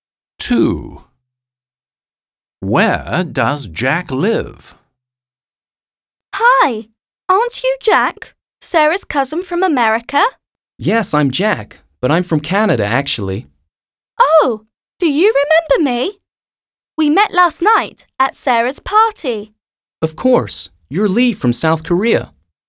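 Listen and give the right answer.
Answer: Canada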